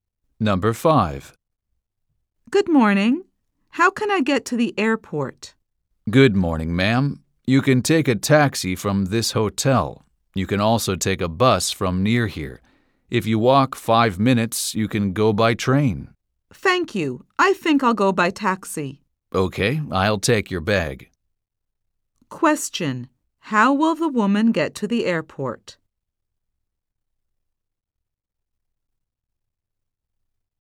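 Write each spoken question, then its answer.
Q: How will the woman get to the airport?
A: By taxi.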